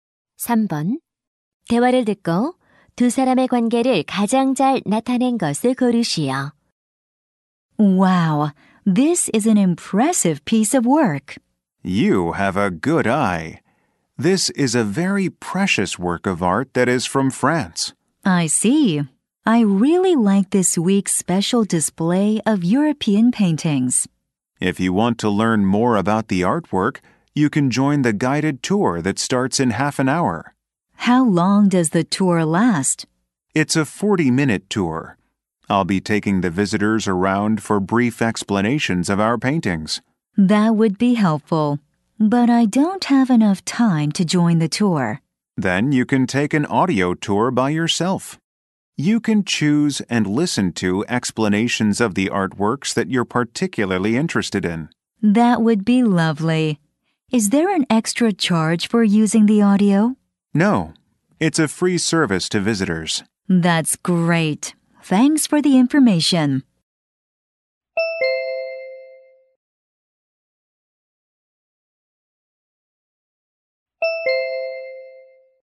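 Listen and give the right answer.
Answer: 미술관 안내원 - 관람객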